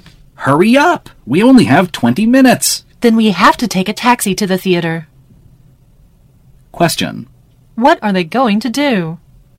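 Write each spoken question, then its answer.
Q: What are they going to do?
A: Take a taxi to the theater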